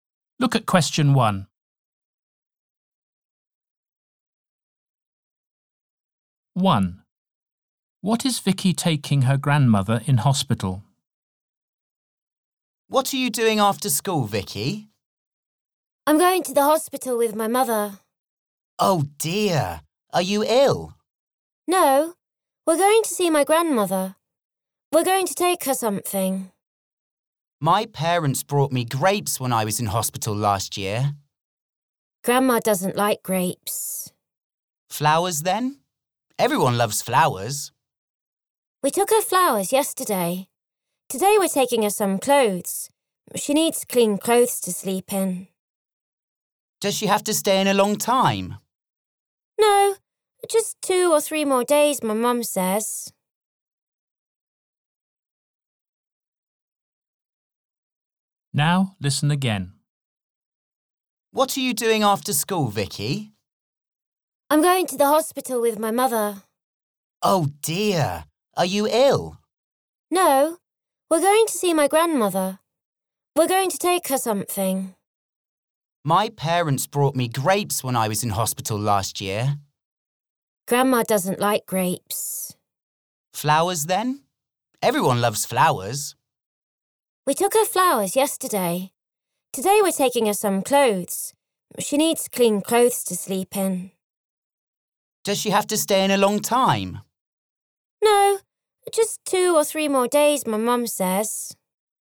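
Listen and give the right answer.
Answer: Some clothes to sleep in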